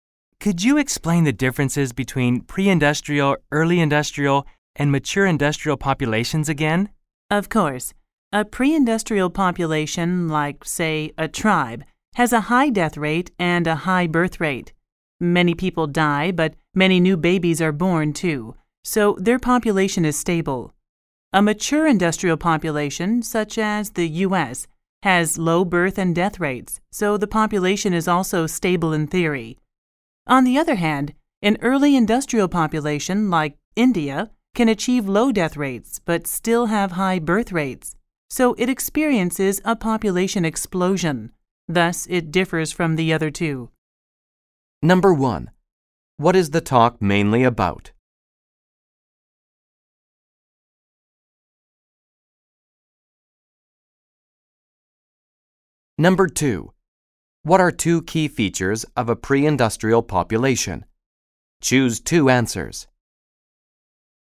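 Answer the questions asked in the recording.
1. The differences between pre-industrial, early industrial and mature industrial populations
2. A high death rate and a high birth rate
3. Pre-industrial, mature industrial, then early industrial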